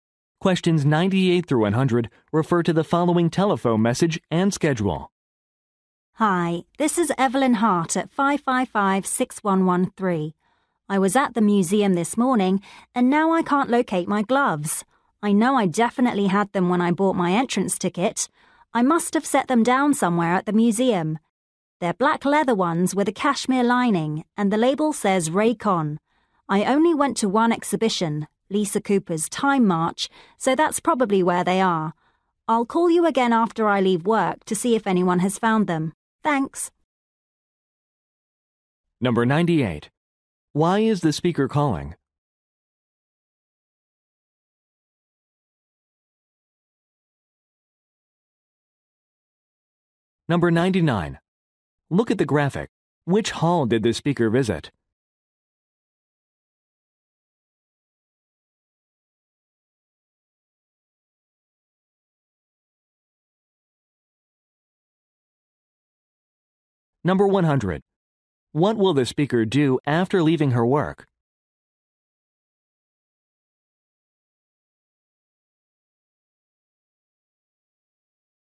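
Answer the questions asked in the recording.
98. She lost her gloves
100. Call the museum again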